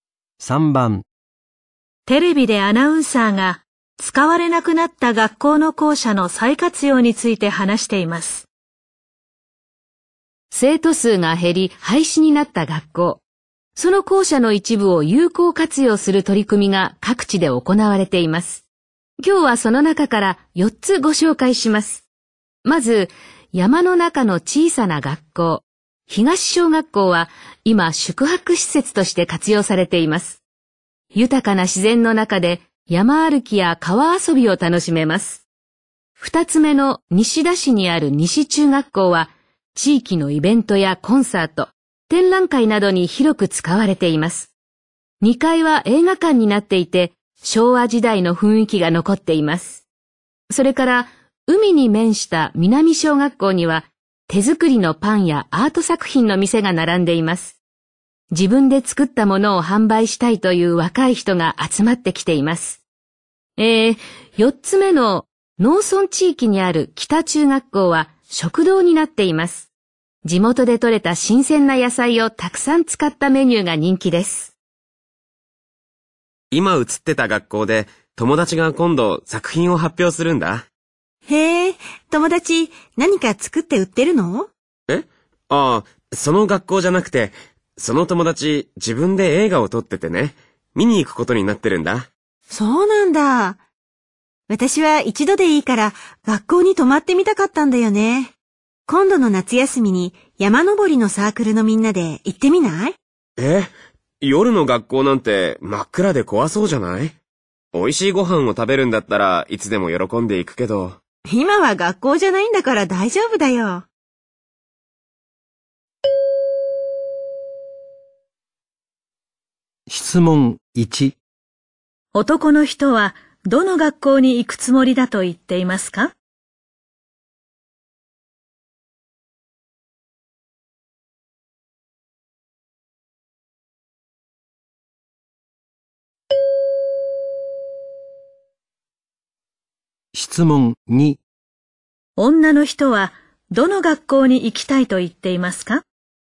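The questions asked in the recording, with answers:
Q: 男の人はどの学校に行くつもりだと言っていますか?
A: 西中学校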